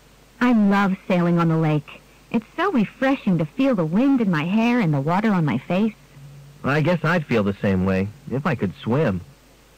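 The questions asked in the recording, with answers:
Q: What can be inferred about the man?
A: He can't swim.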